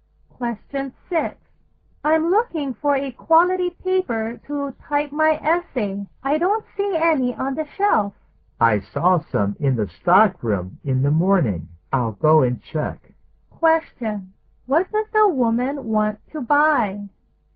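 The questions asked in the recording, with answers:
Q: What does the woman want to buy?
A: Quality typing paper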